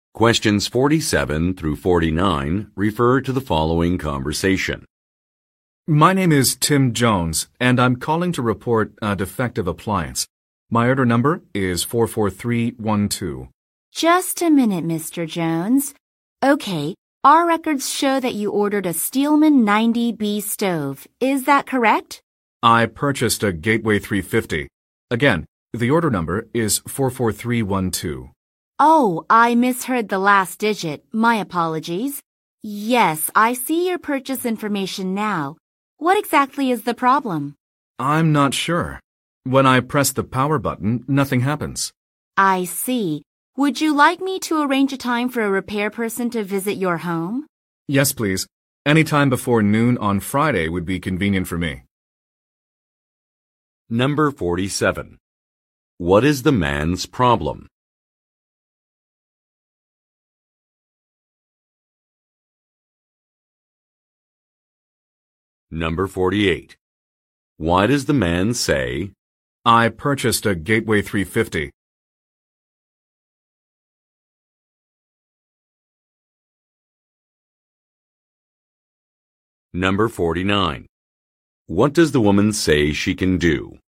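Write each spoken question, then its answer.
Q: What is the man's problem?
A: An appliance he bought is defective; it doesn't turn on.

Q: Why does the man say,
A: To correct the woman's mistake about which product he ordered.

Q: What does the woman say she can do?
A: Arrange a time for a repair person to visit his home.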